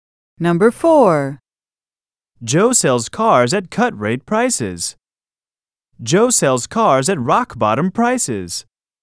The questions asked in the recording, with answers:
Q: Joe sells cars at cut-rate prices. Joe sells cars at rock-bottom prices.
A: Same is the correct answer.